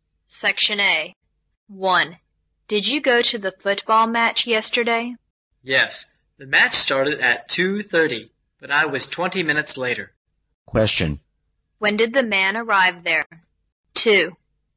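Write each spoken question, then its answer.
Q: When did the man arrive there?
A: At 2:50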